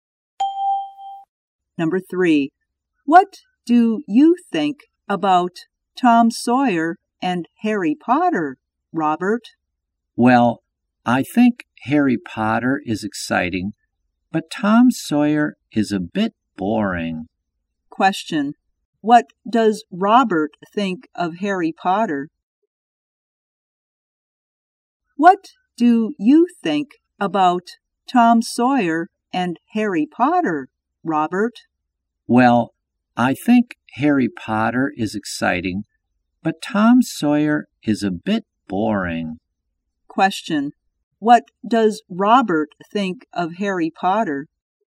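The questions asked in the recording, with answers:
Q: What does Robert think of Harry Potter?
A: It is exciting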